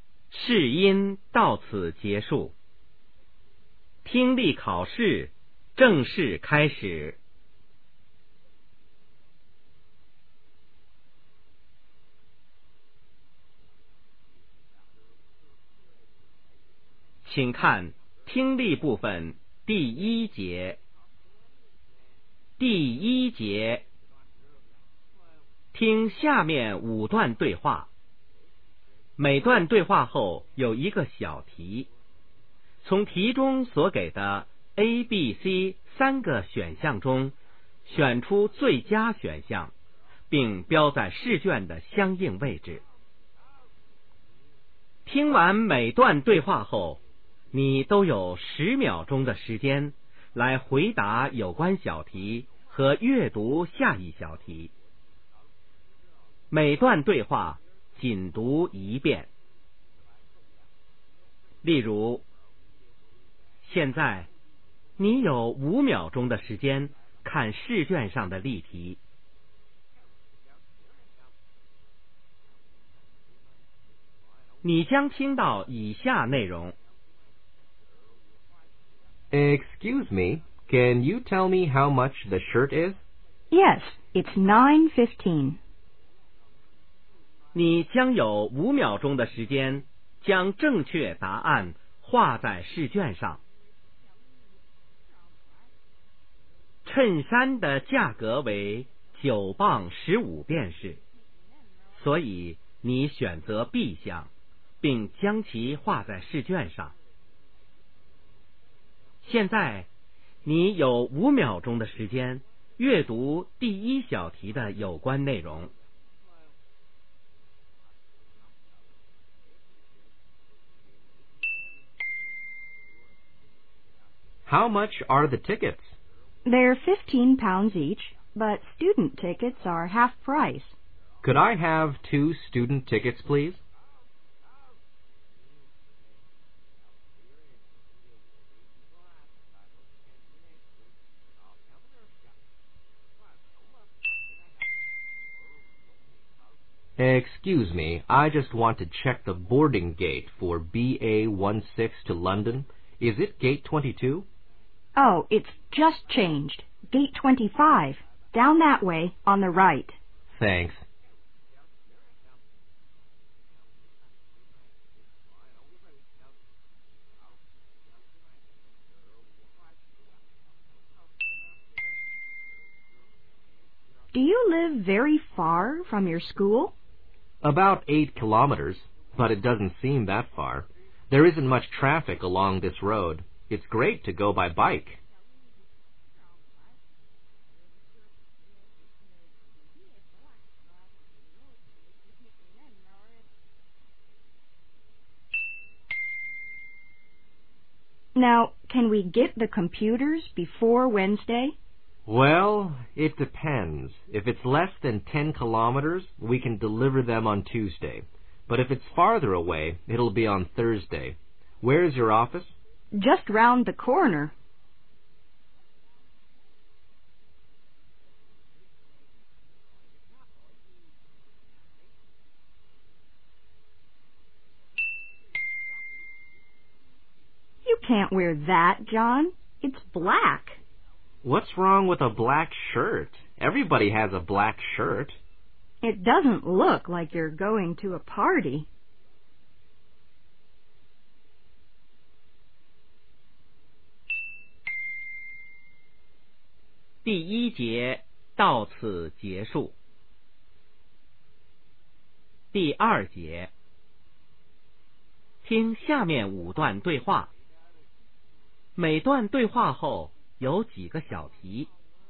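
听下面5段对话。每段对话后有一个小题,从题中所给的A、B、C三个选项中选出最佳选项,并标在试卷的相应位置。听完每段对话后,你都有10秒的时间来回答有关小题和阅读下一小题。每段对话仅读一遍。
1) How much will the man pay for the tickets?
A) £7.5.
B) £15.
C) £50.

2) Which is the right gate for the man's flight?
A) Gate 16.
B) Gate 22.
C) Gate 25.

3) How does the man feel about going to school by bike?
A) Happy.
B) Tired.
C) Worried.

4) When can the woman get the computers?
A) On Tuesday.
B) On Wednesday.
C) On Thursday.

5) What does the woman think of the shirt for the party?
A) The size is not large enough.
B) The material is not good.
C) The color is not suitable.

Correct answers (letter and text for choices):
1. B) £15.
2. C) Gate 25.
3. A) Happy.
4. A) On Tuesday.
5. C) The color is not suitable.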